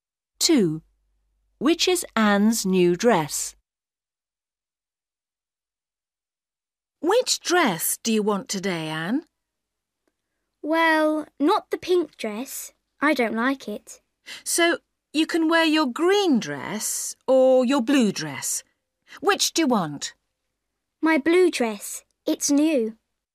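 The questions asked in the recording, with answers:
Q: Which is Anne's new dress?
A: the blue dress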